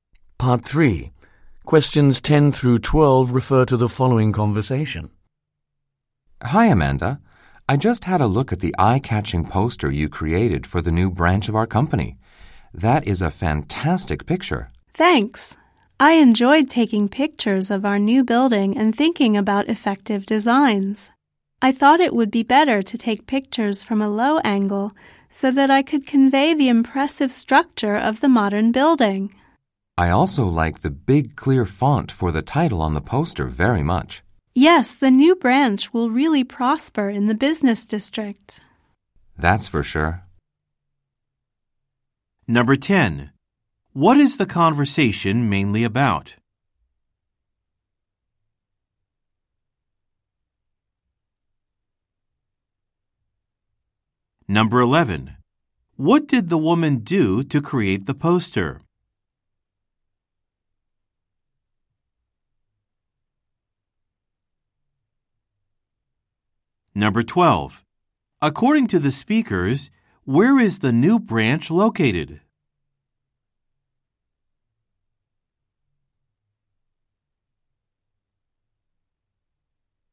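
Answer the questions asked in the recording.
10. A poster the woman created for the company's new branch
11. She took pictures of the new building from a low angle
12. In the business district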